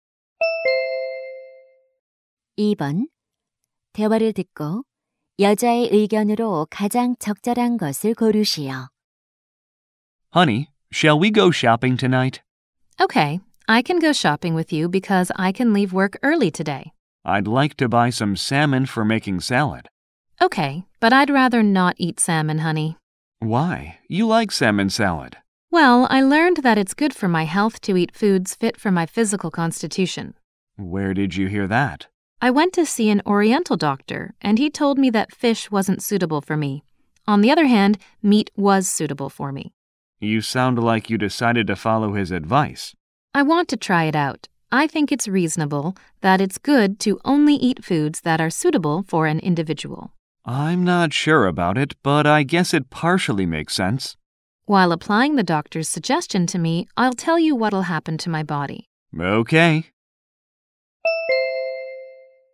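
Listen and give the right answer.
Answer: 자신의 체질에 맞는 음식을 먹는 것이 건강에 좋다.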